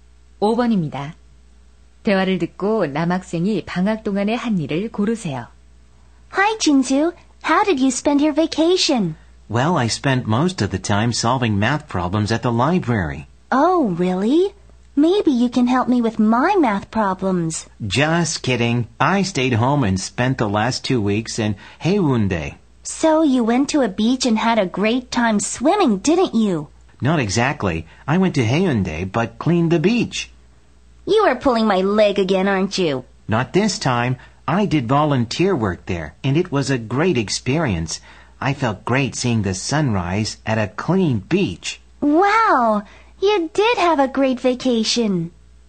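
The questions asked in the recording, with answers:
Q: 대화를 듣고 남학생이 방학 동안에 한 일을 고르세요.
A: 해운대 해변 청소 자원봉사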